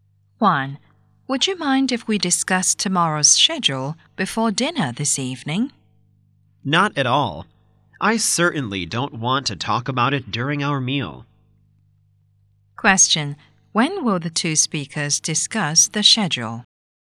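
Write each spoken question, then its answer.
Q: When will the two speakers discuss the schedule?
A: Before dinner this evening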